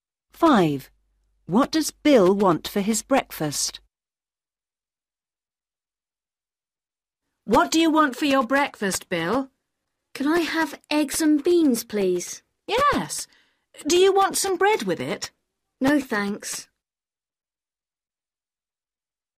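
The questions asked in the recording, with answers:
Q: What does Bill want for his breakfast?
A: Eggs and beans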